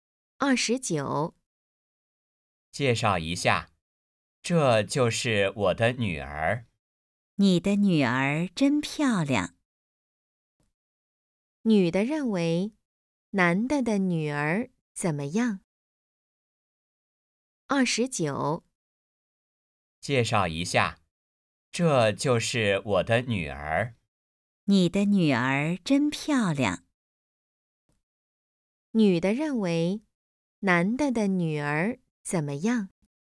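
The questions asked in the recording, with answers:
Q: 女的认为男的的女儿怎么样?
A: 很漂亮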